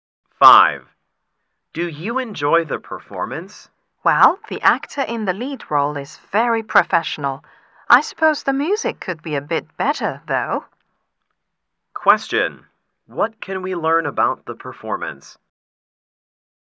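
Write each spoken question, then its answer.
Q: What can we learn about the performance?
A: The lead actor was very professional, but the music could have been better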